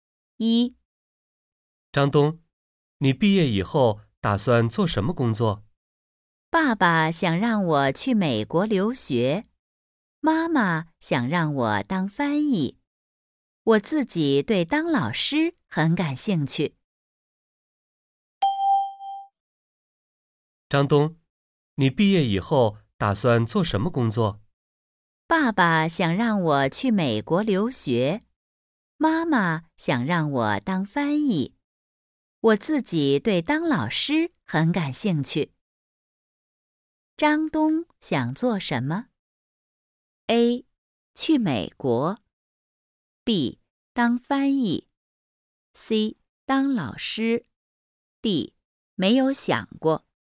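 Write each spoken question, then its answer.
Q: 张东想做什么?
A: C: 当老师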